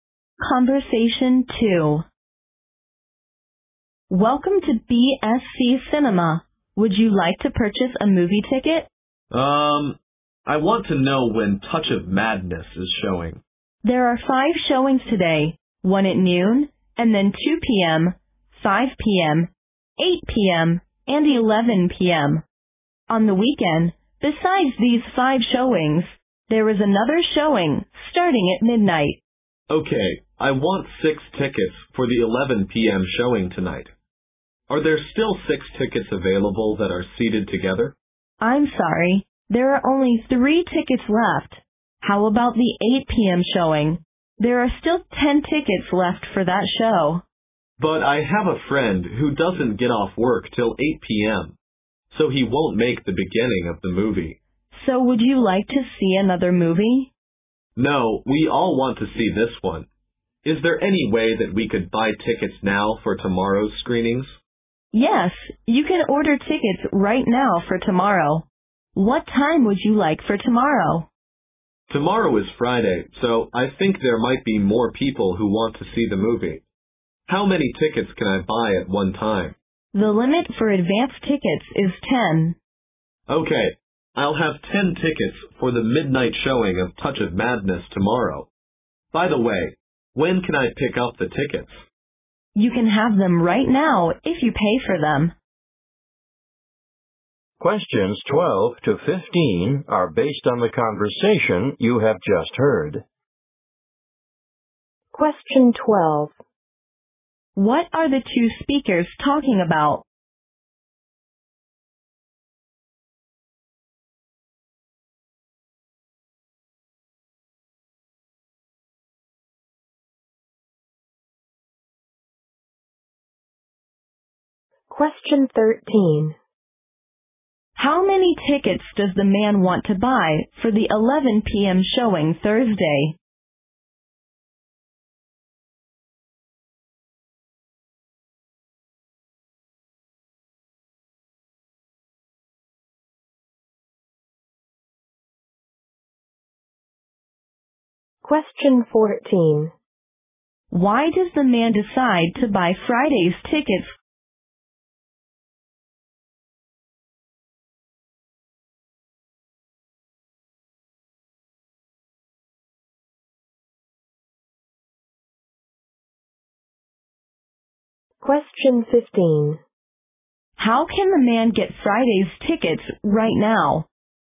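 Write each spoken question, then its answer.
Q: What are the two speakers talking about?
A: Buying movie tickets for Touch of Madness

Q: How many tickets does the man want to buy for the 11 p.m.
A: Six

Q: How can the man get Friday's tickets right now?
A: By paying for them now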